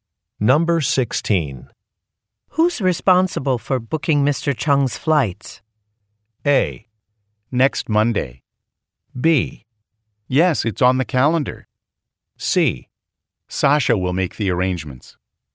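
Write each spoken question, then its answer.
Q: Who's responsible for booking Mr. Chung's flights?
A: C: Sasha will make the arrangements.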